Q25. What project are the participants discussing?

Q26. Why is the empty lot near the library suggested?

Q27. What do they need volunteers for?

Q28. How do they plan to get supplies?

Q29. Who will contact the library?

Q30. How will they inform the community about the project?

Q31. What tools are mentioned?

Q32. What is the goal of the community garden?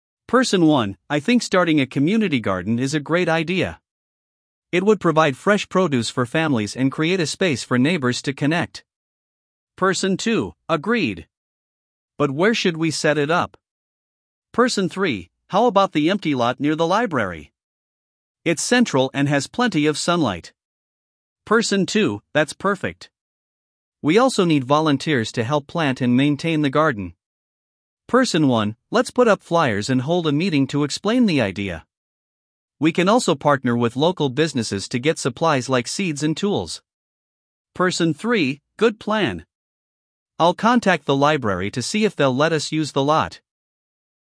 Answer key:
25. Community garden
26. Central and sunny
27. Planting and maintenance
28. Partner with businesses
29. Person 3
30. Flyers and a meeting
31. Seeds and tools
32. Fresh produce and connection

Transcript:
Person 1: I think starting a community garden is a great idea. It would provide fresh produce for families and create a space for neighbors to connect.
Person 2: Agreed! But where should we set it up?
Person 3: How about the empty lot near the library? It's central and has plenty of sunlight.
Person 2: That's perfect. We also need volunteers to help plant and maintain the garden.
Person 1: Let's put up flyers and hold a meeting to explain the idea. We can also partner with local businesses to get supplies like seeds and tools.
Person 3: Good plan. I'll contact the library to see if they'll let us use the lot.